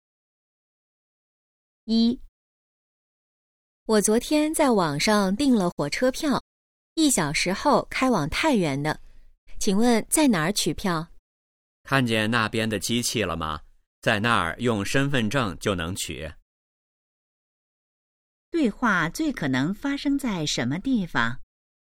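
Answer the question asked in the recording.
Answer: 火车站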